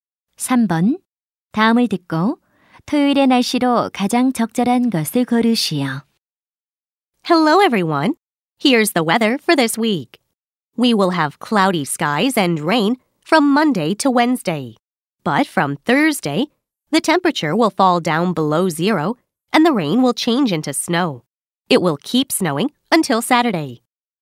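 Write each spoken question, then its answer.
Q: 다음을 듣고 토요일의 날씨로 가장 적절한 것을 고르시오.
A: 눈이 옴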